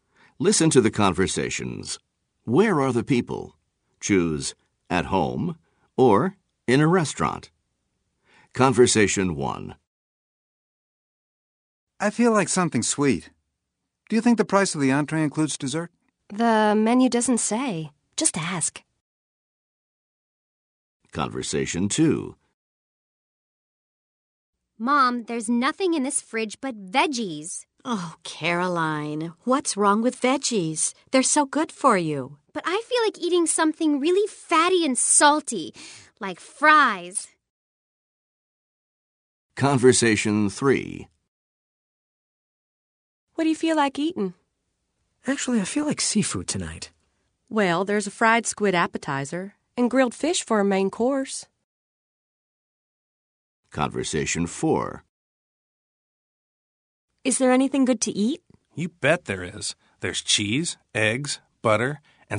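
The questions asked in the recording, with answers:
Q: Where are the people? Choose at home or in a restaurant.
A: in a restaurant

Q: Where are the people? Choose at home or in a restaurant.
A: at home

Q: Where are the people? Choose at home or in a restaurant.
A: in a restaurant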